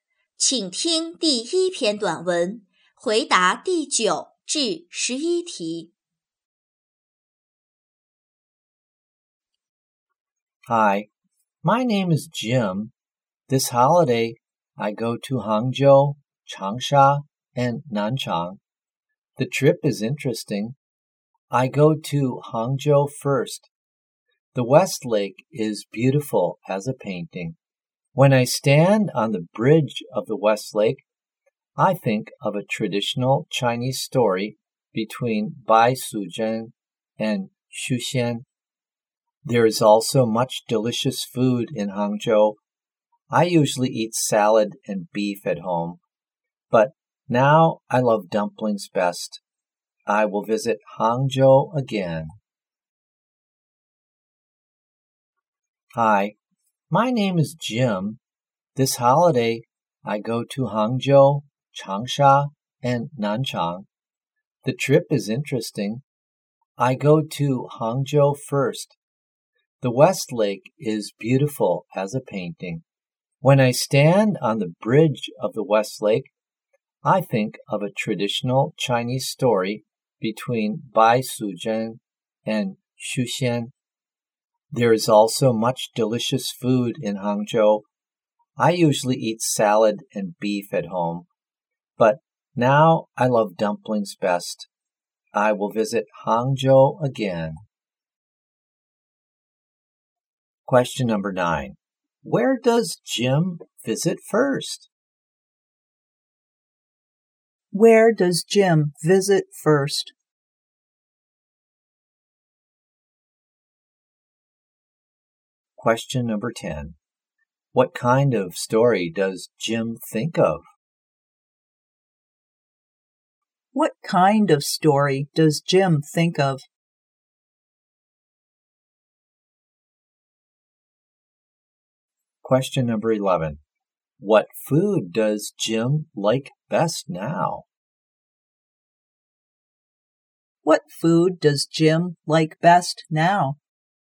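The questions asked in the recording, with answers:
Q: Where does Jim visit first?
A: Hangzhou

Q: What kind of story does Jim think of?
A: A traditional Chinese story

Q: What food does Jim like best now?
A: Dumplings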